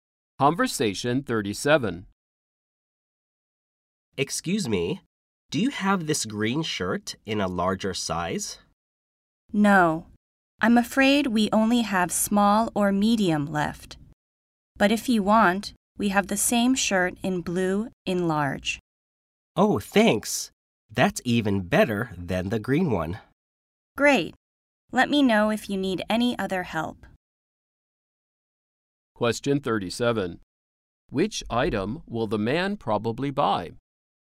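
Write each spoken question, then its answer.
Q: Which item will the man probably buy?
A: The blue shirt in large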